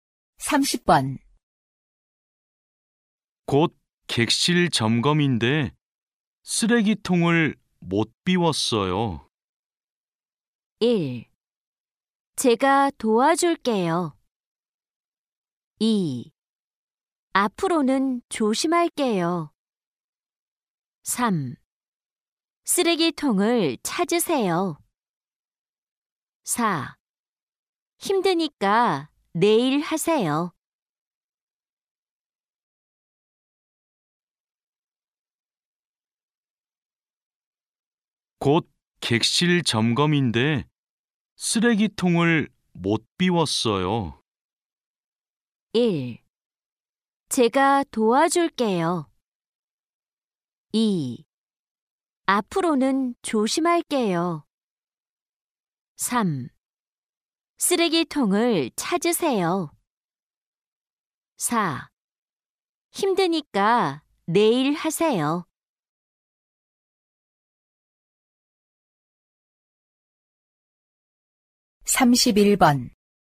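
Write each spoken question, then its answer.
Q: 곧 객실 점검인데 쓰레기통을 못 비웠어요.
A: 1: 제가 도와줄게요.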